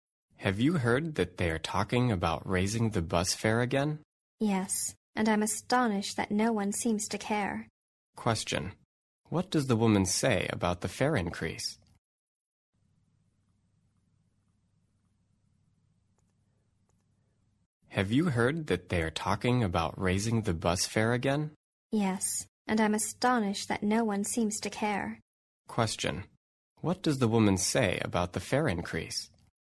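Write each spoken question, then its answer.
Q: What does the woman say about the fare increase?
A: She is astonished that no one seems to care about it.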